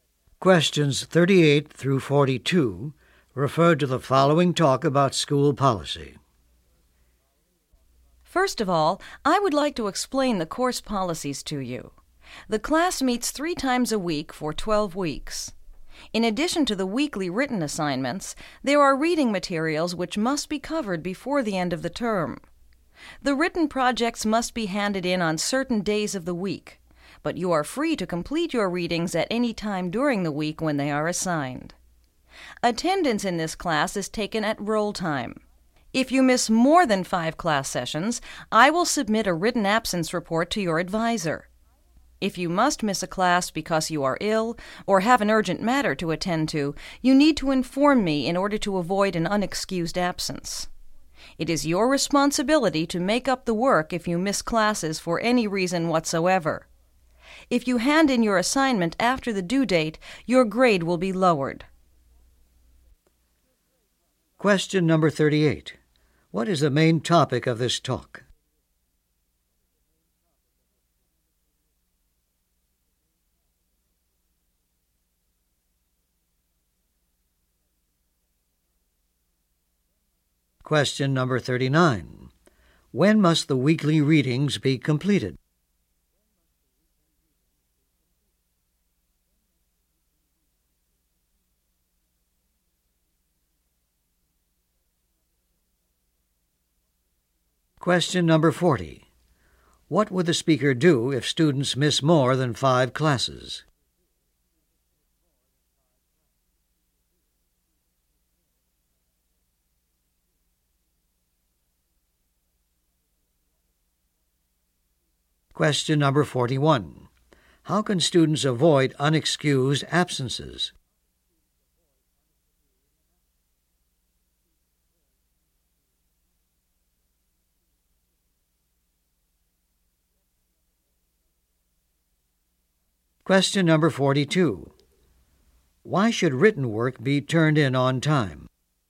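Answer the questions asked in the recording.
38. Course policies
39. Any time during the week they are assigned
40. Submit a written absence report to their advisor
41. By informing the instructor
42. Late work gets a lowered grade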